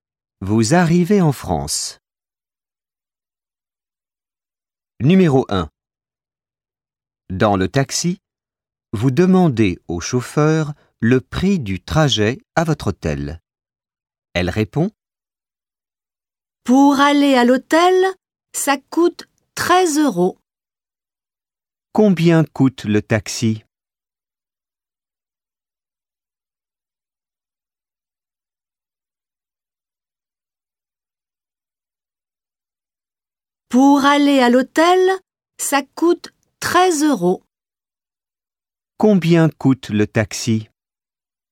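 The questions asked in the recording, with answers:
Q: Combien coûte le taxi?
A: 13 euros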